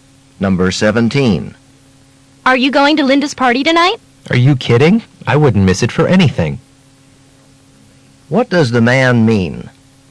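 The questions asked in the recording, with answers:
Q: What does the man mean?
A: He will definitely go to the party.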